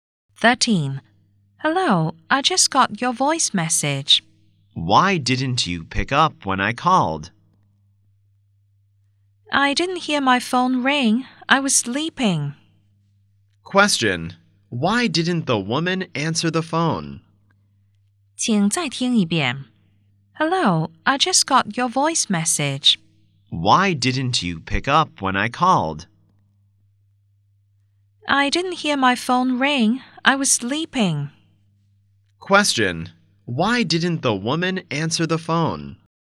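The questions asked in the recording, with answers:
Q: Why didn't the woman answer the phone?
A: She was sleeping and didn't hear it ring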